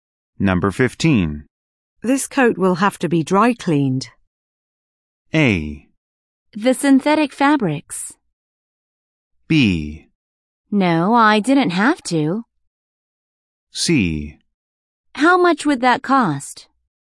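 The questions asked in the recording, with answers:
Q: This coat will have to be dry cleaned.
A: C: How much would that cost?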